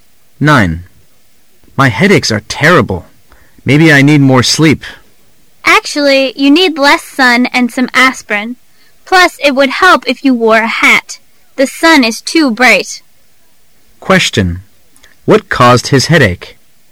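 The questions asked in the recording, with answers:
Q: What caused his headache?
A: Too much sun

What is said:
[解析] M: My headaches are terrible. Maybe I need more sleep. W: Actually, yon need less sun and some aspirin. Plus it would help if you wore a hat. The sun is too bright. Q: What caused his headache?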